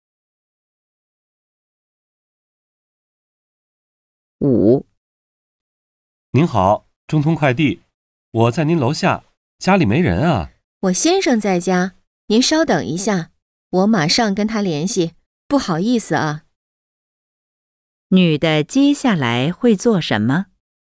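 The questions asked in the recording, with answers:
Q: 女的接下来会做什么?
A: 跟她先生联系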